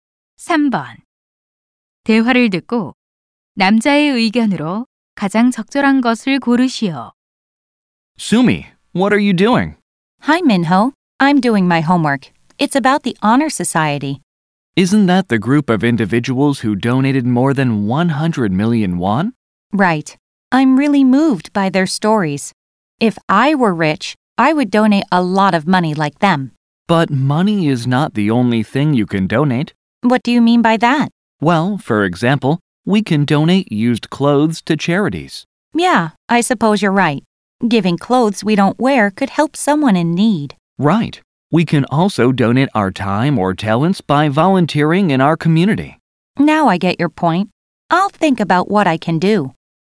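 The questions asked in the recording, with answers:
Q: 대화를 듣고 남자의 의견으로 가장 적절한 것을 고르시오.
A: 돈 외에도 물건, 시간, 재능 등 다양한 것을 기부할 수 있다.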